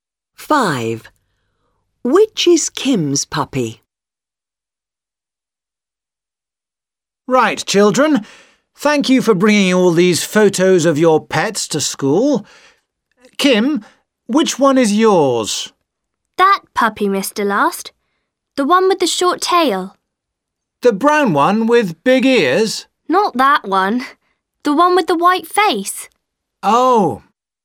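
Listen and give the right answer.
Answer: The one with the short tail and white face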